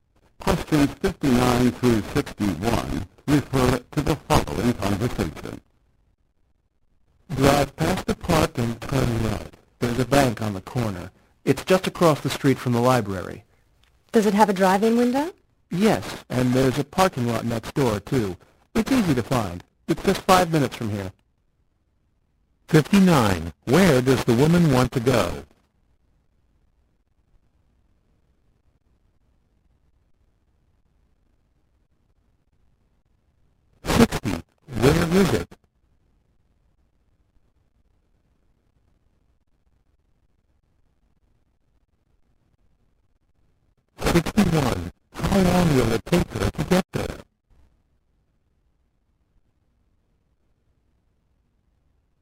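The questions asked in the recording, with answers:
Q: Where does the woman want to go?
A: To a bank

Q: Where is it?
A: Across the street from the library

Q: How long will it take her to get there?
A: 5 minutes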